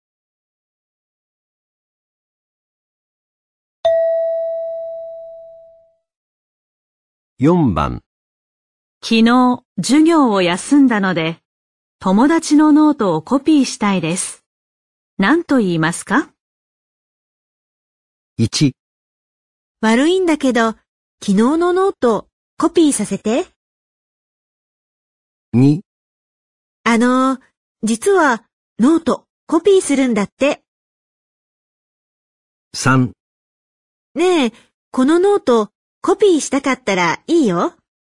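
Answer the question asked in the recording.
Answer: 1: 悪いんだけど、昨日のノートコピーさせて。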